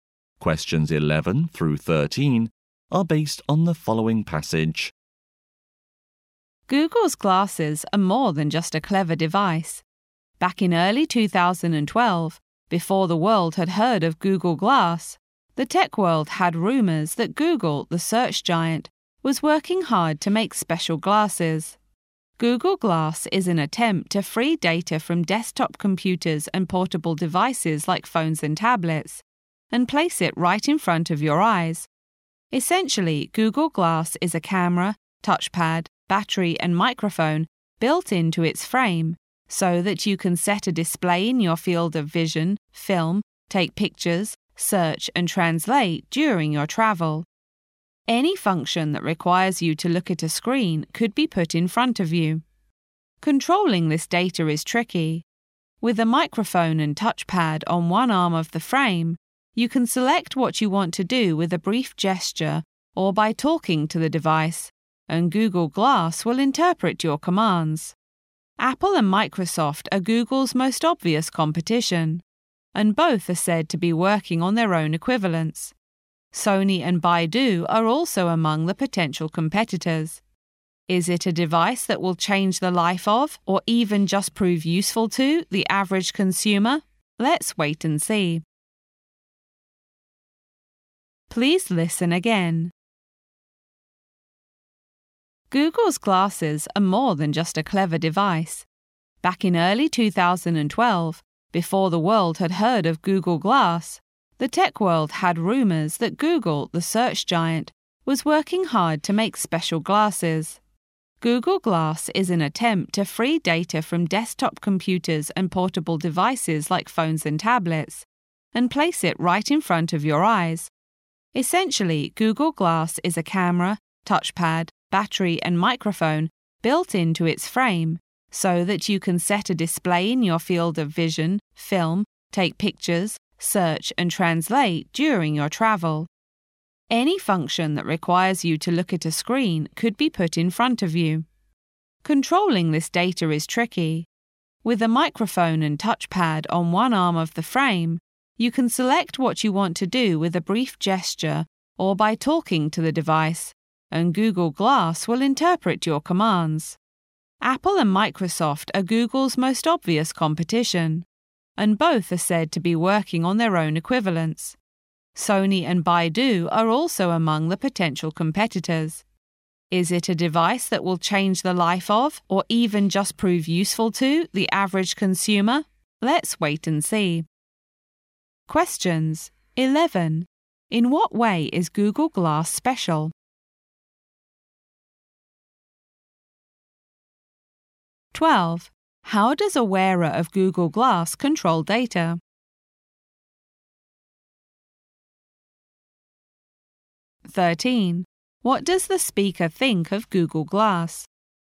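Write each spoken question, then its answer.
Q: How does a wearer of Google Glass control data?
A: By a brief gesture on the touchpad or by talking to it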